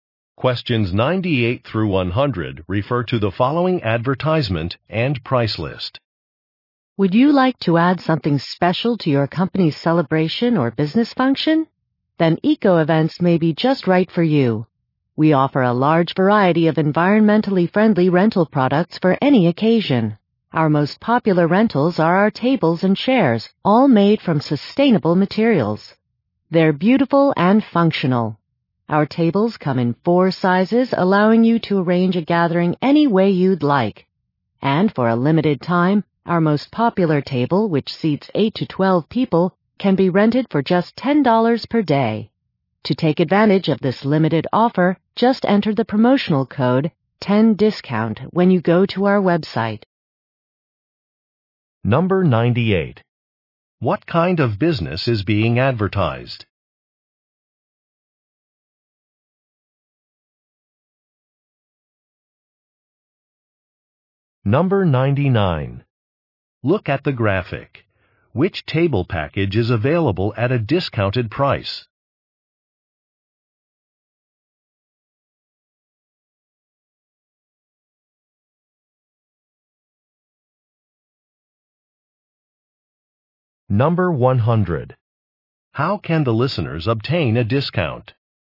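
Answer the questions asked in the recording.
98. An event rental company
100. Enter a promotional code on the website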